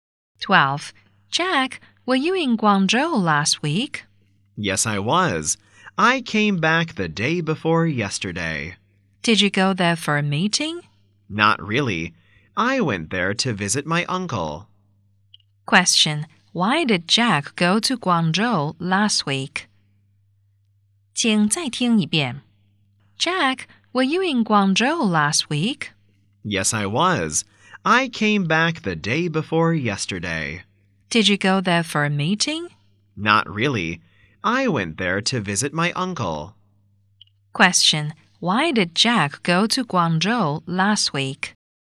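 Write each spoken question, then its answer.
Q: why did Jack go to Guangzhou last week?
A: To visit his uncle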